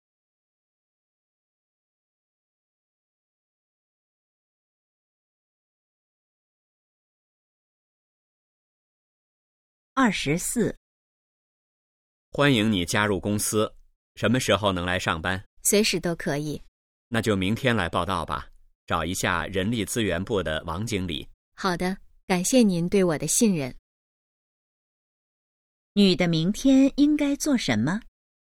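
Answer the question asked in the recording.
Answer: 去公司报到,找人力资源部的王经理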